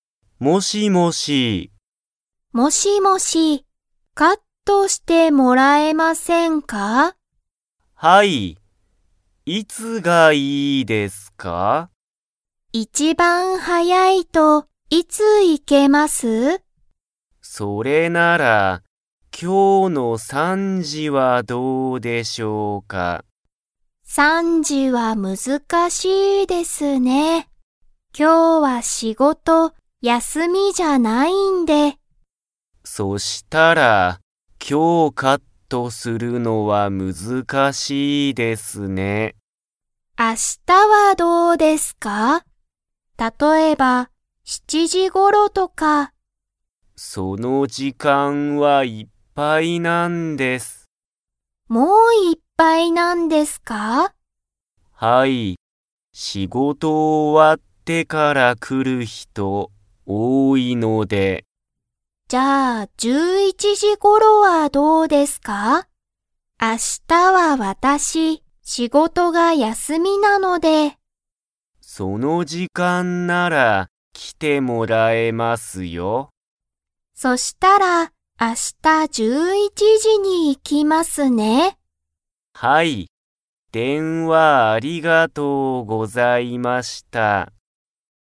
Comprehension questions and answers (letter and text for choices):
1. ハルは、今日(きょう)、カットしてもらいますか?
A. はい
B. いいえ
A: B. いいえ

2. ハルは、____仕事(しごと)が休(やす)みだ。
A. 今日(きょう)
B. 明日(あした)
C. 一番早(いちばんはや)く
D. 電話(でんわ)の後(あと)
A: B. 明日(あした)

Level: Level 2